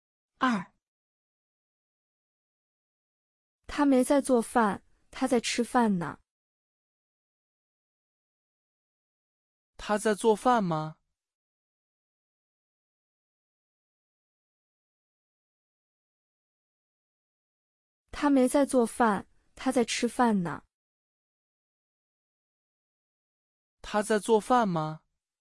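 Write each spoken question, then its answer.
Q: 他在做饭吗?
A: 没在做饭,他在吃饭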